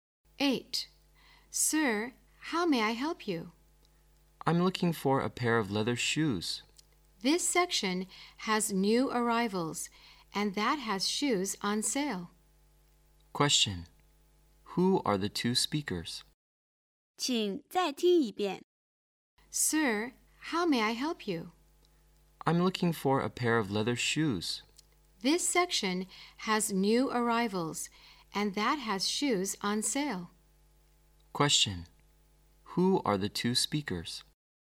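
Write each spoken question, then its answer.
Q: Who are the two speakers?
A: A shop assistant and a customer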